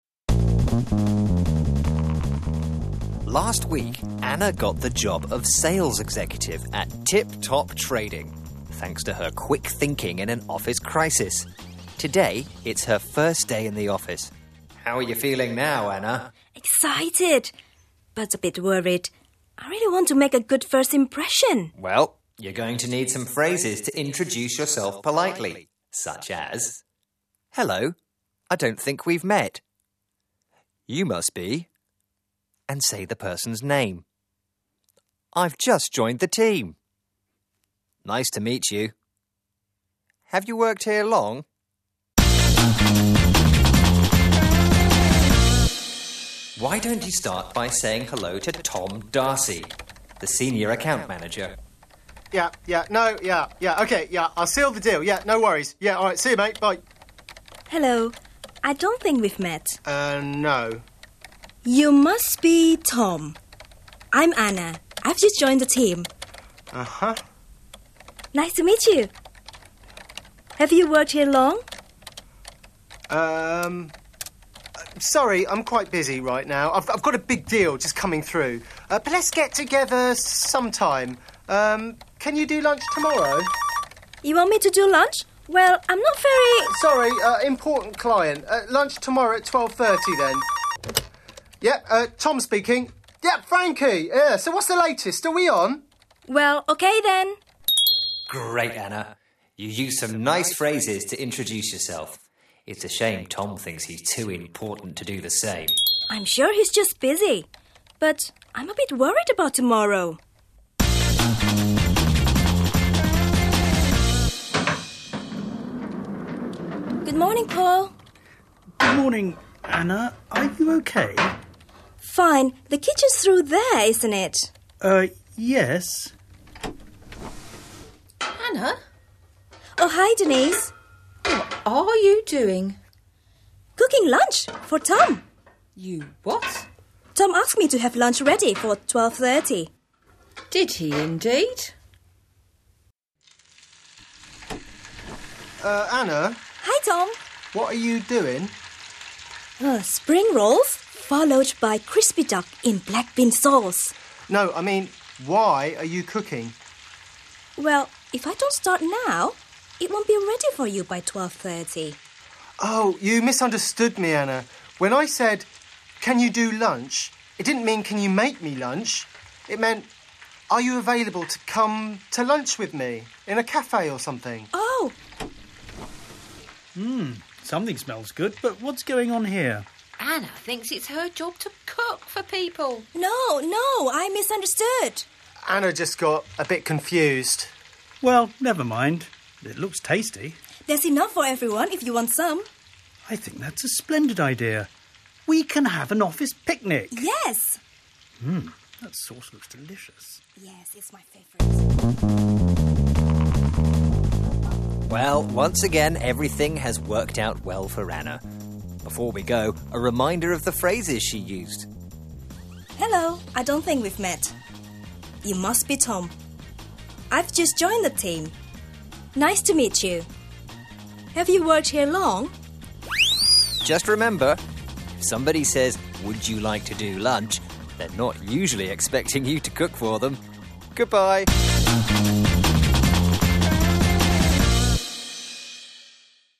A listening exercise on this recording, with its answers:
?What is Tom's job title at Tip Top Trading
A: Senior Account Manager